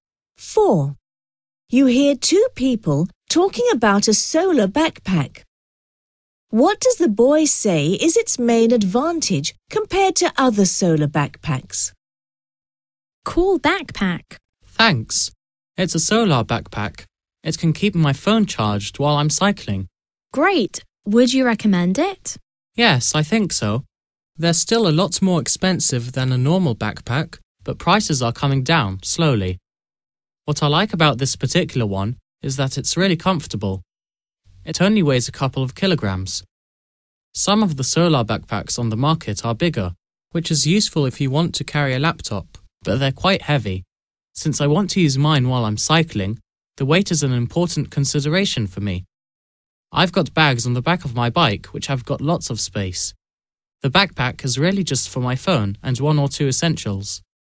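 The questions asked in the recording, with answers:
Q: What does the boy say is its main advantage compared to other solar backpacks?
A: It's light and comfortable (weighs only a couple of kilograms)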